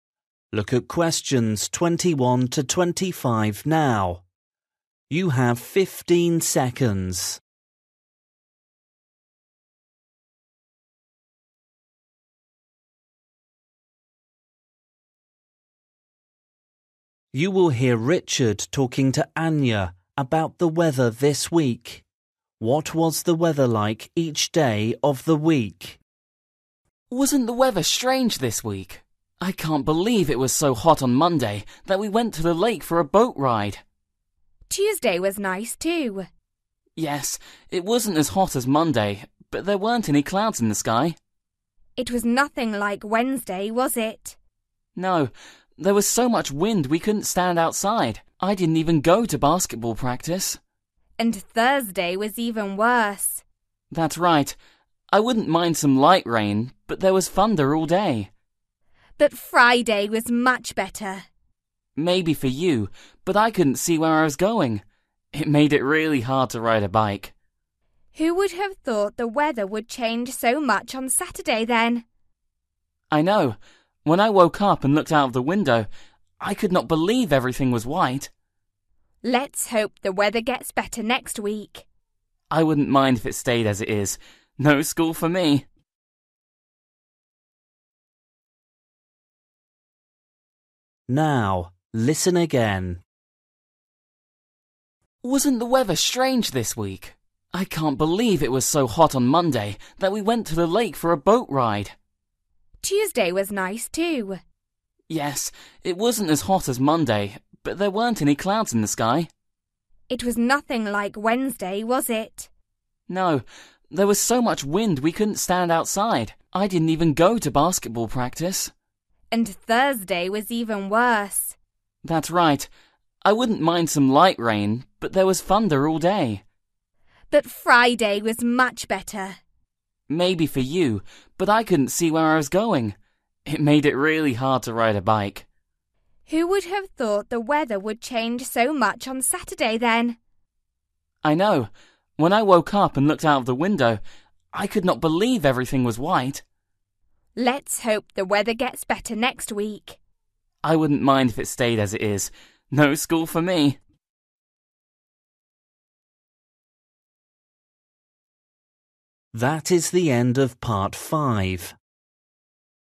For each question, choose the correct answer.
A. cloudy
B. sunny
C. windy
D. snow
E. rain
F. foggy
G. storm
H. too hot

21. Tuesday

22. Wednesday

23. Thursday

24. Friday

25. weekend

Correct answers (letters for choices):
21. B
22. C
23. G
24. F
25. D

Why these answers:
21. Yes, it wasn't as hot as Monday but there weren't any clouds in the sky.
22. there was so much wind we couldn't stand outside.
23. there was thunder all day.
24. I couldn't see where I was going. It made it really hard to ride a bike.
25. I could not believe everything was white.

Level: KET (A2)